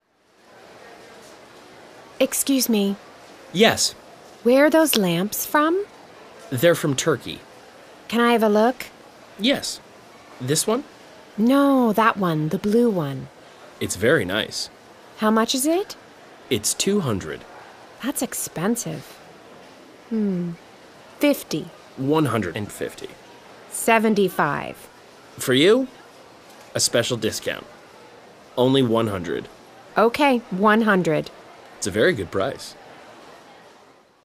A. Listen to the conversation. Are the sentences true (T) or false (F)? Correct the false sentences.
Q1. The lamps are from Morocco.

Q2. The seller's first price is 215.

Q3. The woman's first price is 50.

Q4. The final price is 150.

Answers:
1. F
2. F
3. T
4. F

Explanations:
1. They're from Turkey.
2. The seller's first price is 200.
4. The final price is 100.